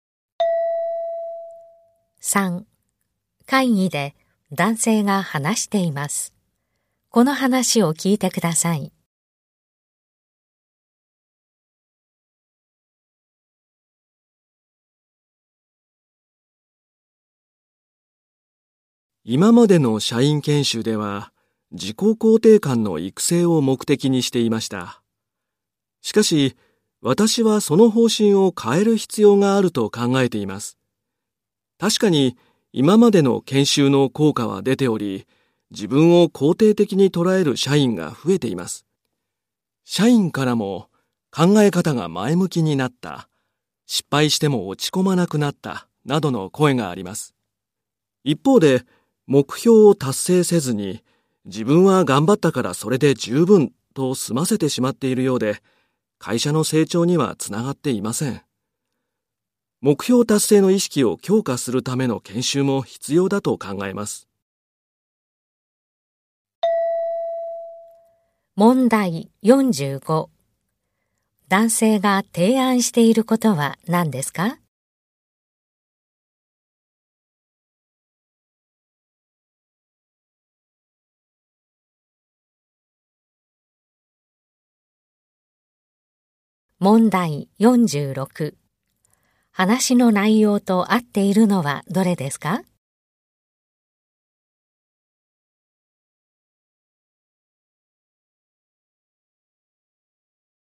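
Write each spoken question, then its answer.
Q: 男性が提案していることは何ですか?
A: 目標達成の意識を強化するための研修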